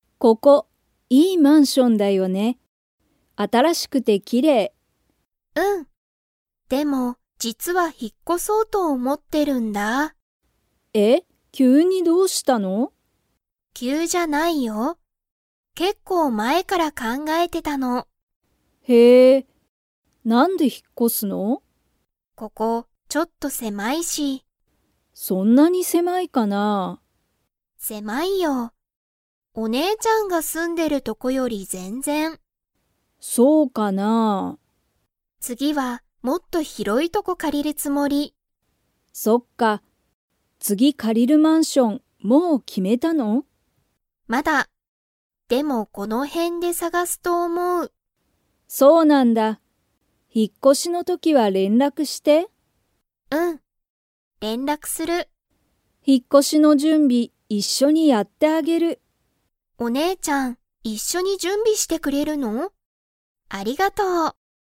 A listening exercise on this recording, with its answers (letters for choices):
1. さちえは、今いまのマンションが から引ひっ越こしたい。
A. 広ひろい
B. 狭せまい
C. 安やすい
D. 高たかい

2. さちえは、次つぎ借かりるマンションをもう決きめましたか?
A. はい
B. いいえ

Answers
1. B
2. B

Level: Level 4